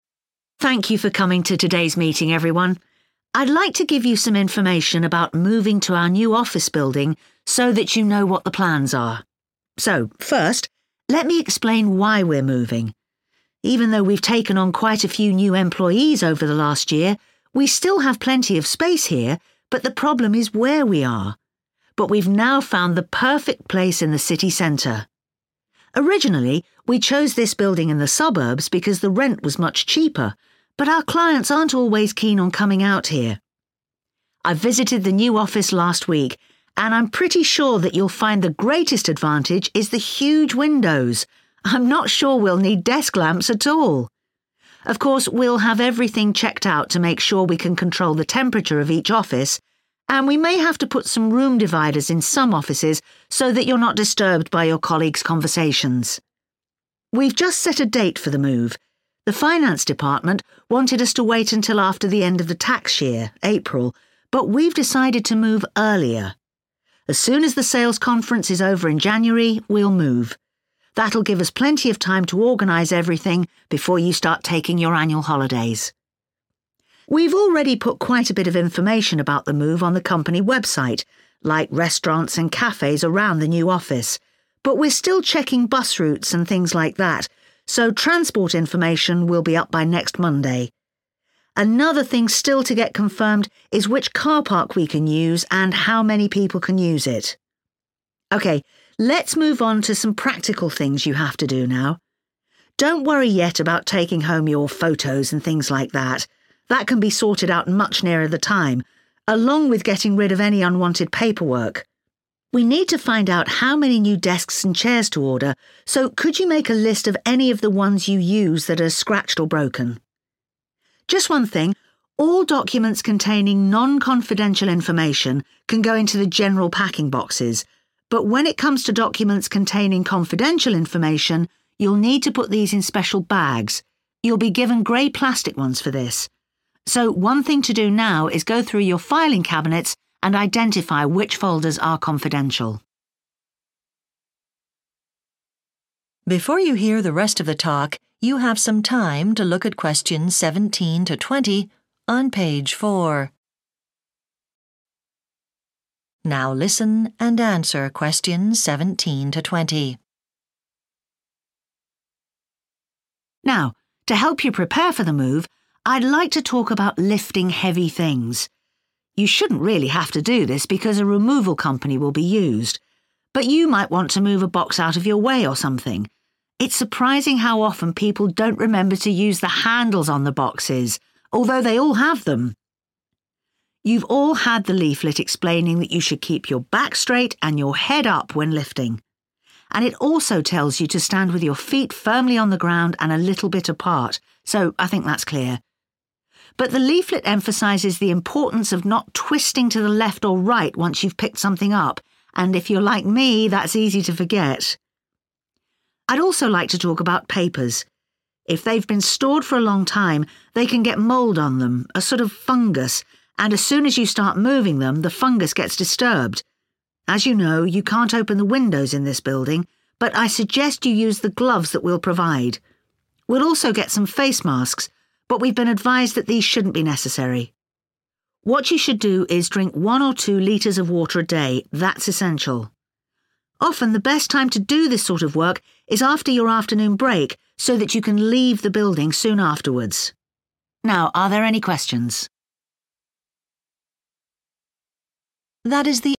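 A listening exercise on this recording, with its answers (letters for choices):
Choose the correct letter, A, B or C.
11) What reason does the manager give for moving to a new office building?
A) to have more space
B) to pay less rent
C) be in a central location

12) What is best about the new office building?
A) the air-conditioning system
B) the amount of natural light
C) the low level of noise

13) When will the office move take place?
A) after the sales conference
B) after the end of the tax year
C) after the annual holiday period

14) What information about the new location is already on the company website?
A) where to park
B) places to eat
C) public transport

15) What practical thing must staff do now?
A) give details of damaged furniture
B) throw away unnecessary papers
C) take home personal items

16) Staff will need to put folders containing confidential details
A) into packing boxes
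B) into grey plastic bags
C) into new filing cabinets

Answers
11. C
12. B
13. A
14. B
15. A
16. B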